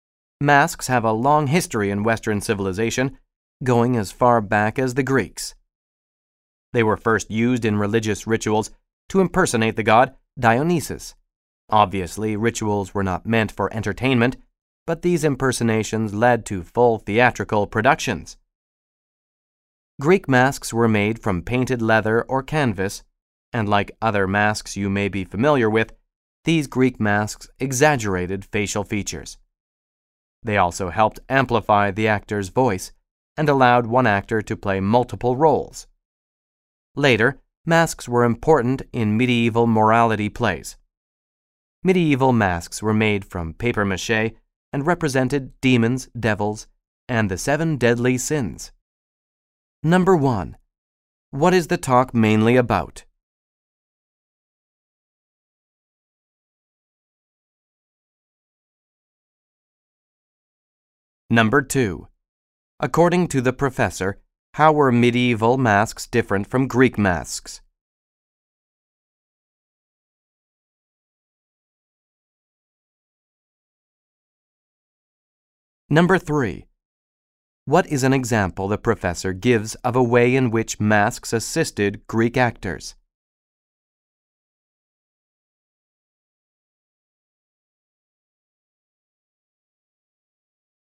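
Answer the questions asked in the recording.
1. The history of masks in Western theater, from Greek to medieval times
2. They were made from papier-mâché (not painted leather or canvas) and represented demons, devils and the seven deadly sins
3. They amplified the actor's voice (and let one actor play multiple roles)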